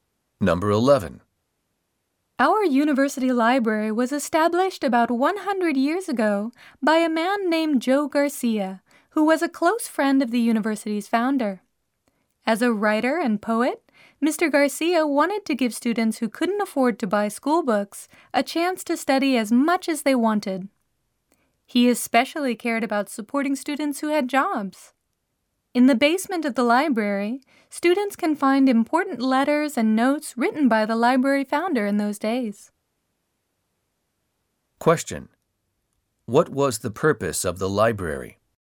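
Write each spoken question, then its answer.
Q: What was the purpose of the library?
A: To let students who couldn't afford school books study as much as they wanted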